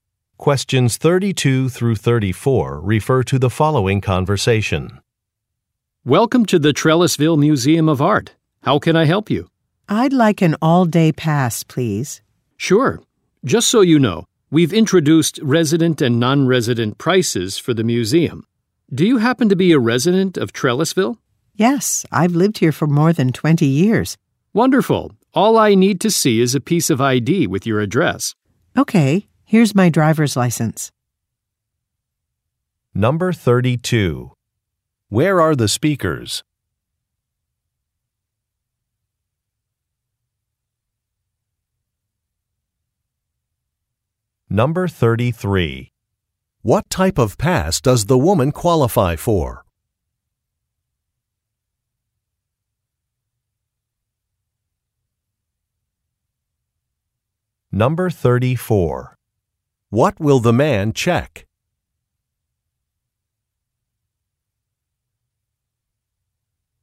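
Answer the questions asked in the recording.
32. At an art museum
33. A resident pass
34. Her ID (driver's license) showing her address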